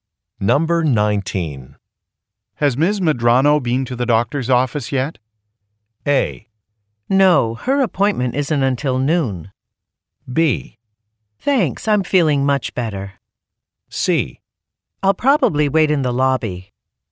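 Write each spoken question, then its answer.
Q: Has Ms. Medrano been to the doctor's office yet?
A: A: No, her appointment isn't until noon.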